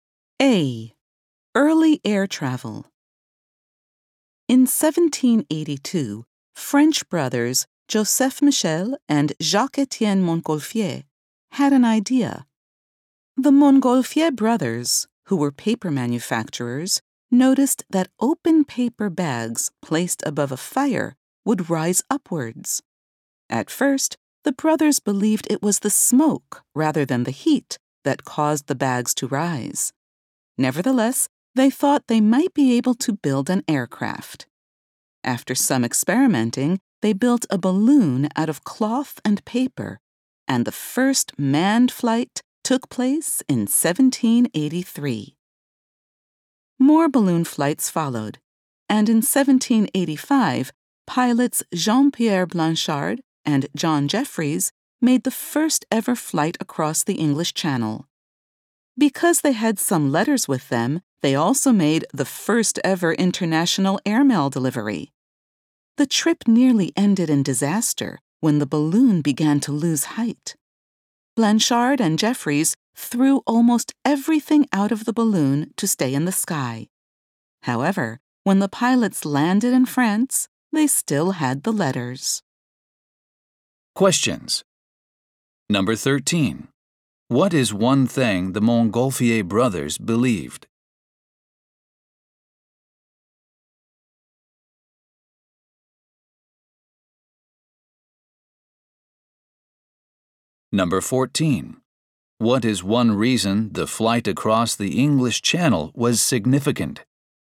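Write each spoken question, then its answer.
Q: What is one thing the Montgolfier brothers believed?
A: That smoke caused the paper bags to rise.

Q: What is one reason the flight across the English Channel was significant?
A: It was the first international airmail delivery.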